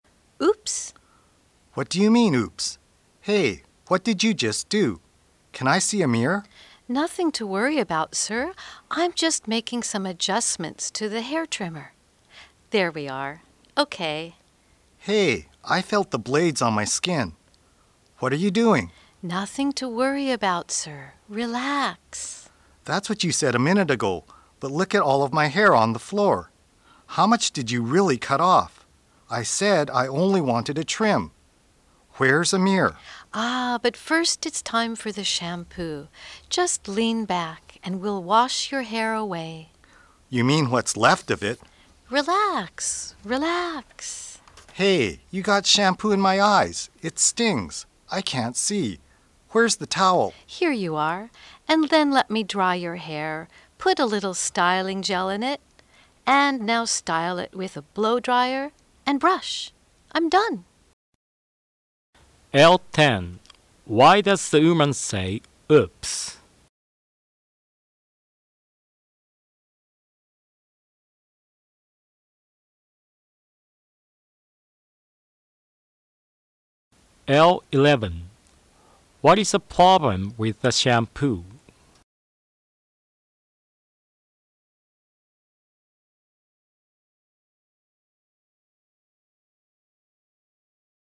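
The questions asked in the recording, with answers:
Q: What is the problem with the shampoo?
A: It got in the man's eyes and stings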